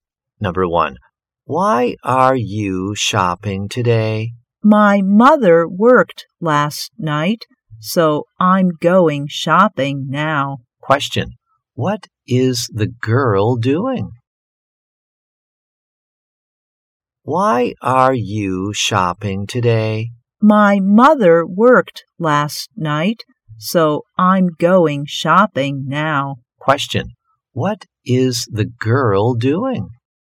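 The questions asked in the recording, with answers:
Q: What is the girl doing?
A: She is going shopping.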